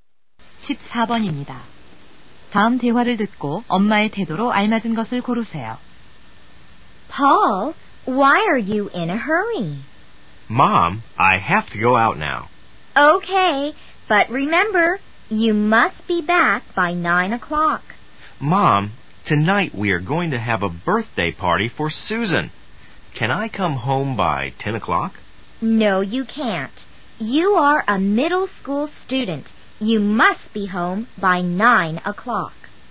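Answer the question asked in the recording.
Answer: 엄격함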